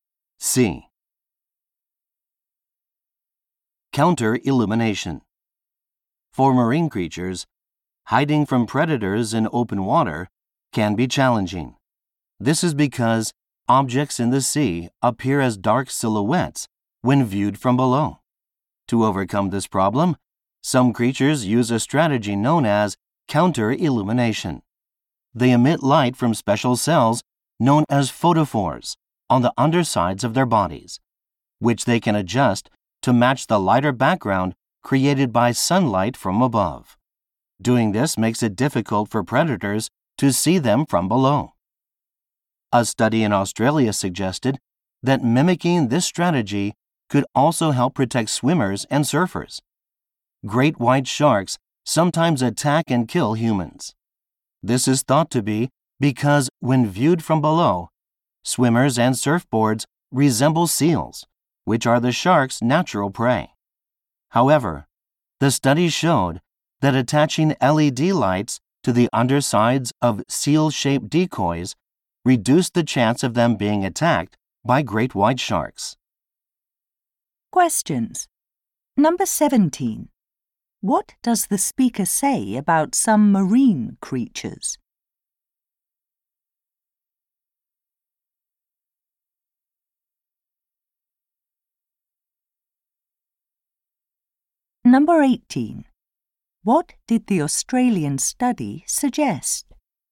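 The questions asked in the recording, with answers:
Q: What does the speaker say about some marine creatures?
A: They emit light from their undersides to hide from predators below

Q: What did the Australian study suggest?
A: Lights on the undersides of swimmers and surfboards could protect them from shark attacks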